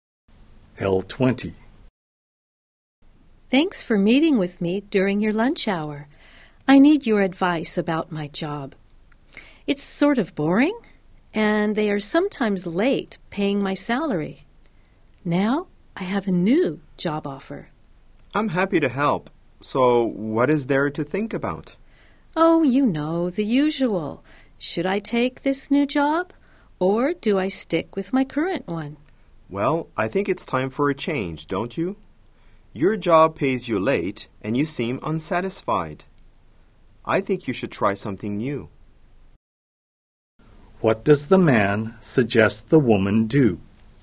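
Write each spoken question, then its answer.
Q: What does the man suggest the woman do?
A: Take the new job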